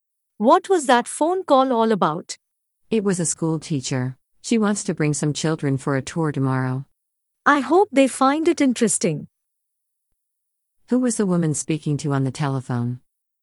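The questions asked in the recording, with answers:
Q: Who was the woman speaking to on the telephone?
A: A school teacher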